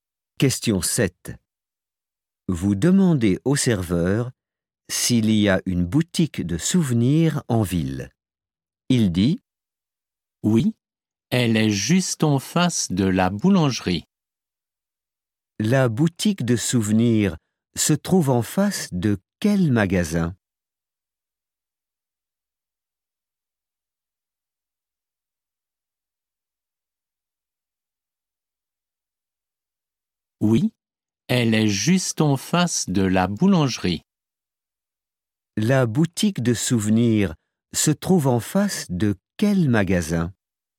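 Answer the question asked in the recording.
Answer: La boulangerie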